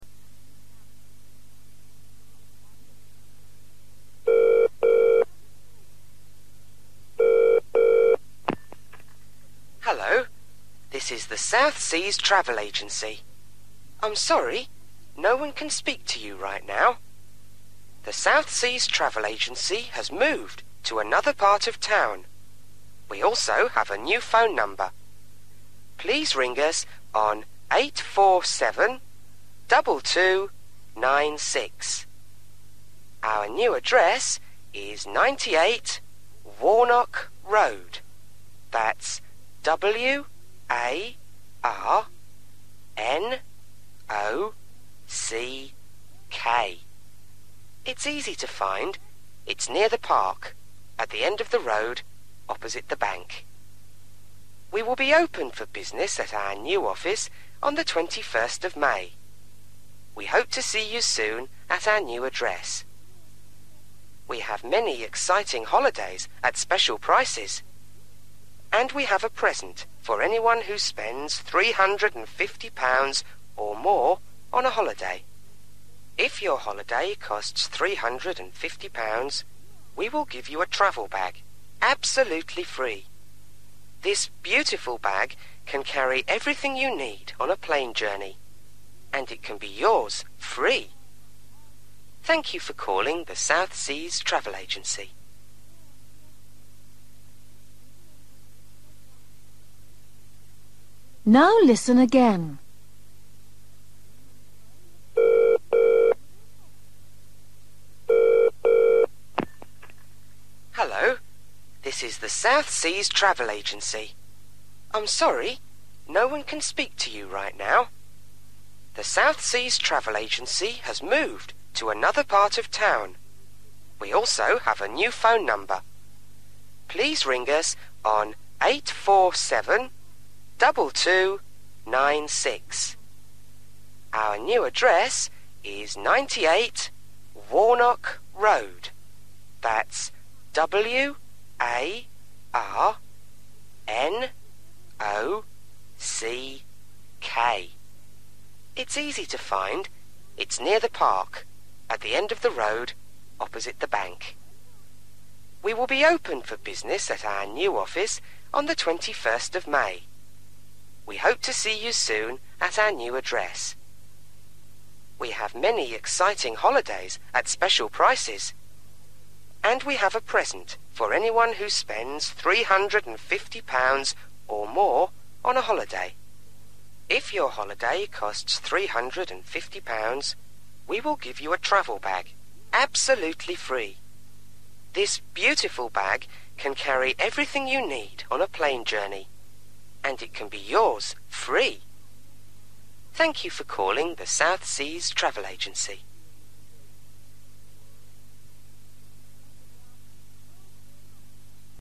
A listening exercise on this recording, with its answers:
Listen and complete questions 21-25.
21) 98_____________ Road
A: Warnock

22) Opposite:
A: (the) bank

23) Opens on:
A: 21st May

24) Book a holiday for:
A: £350 (or more)

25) and get a free:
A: (travel) bag

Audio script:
Answerphone: Hello. This is the South Seas Travel Agency. I'm sorry, no one can speak to you right now. The South Seas Travel Agency has moved to another part of town. We also have a new phone number. Please ring us on 847 2296. Our new address is 98 Warnock Road, that's W-A-R-N-O-C-K. It's easy to find – it's near the park, at the end of the road, opposite the bank. We will be open for business at our new office on 21st May. We hope to see you soon at our new address. We have many exciting holidays at special prices. And we have a present for anyone who spends £350 or more on a holiday. If your holiday costs £350, we will give you a travel bag absolutely free. This beautiful bag can carry everything you need on a plane journey. And it can be yours free. Thank you for calling the South Seas Travel Agency.

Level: A2